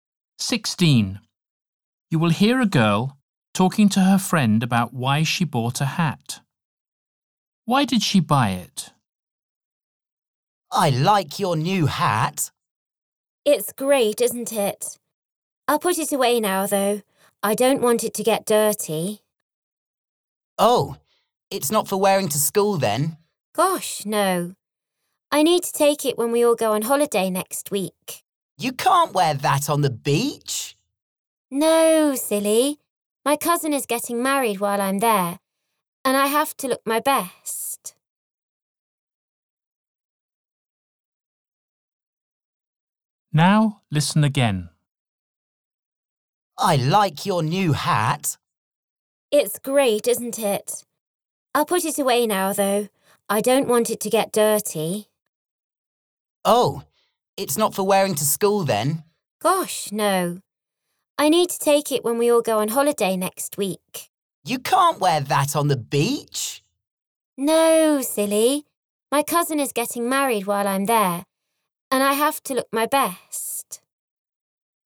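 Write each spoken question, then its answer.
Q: Why did she buy it?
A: To wear at her cousin's wedding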